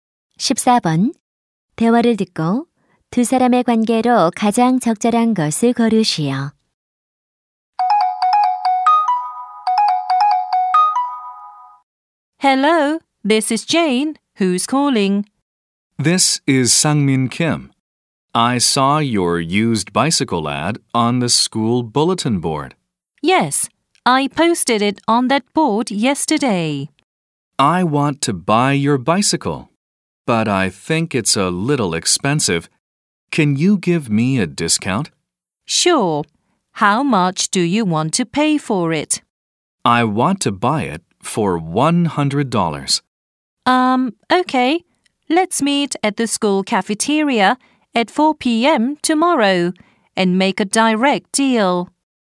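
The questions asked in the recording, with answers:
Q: 대화를 듣고 두 사람의 관계로 가장 적절한 것을 고르시오.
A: 중고 자전거 판매자와 구매자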